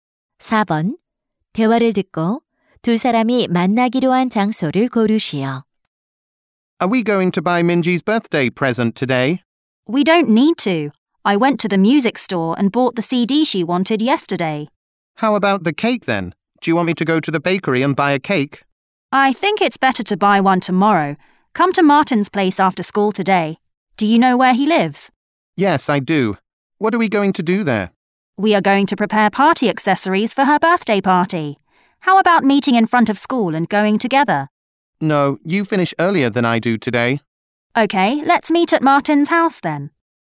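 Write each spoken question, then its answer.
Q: 4번. 대화를 듣고 두 사람이 만나기로 한 장소를 고르시오.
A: Martin의 집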